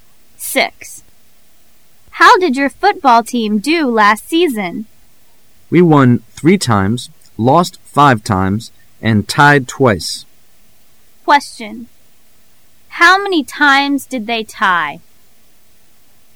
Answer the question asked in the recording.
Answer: 2.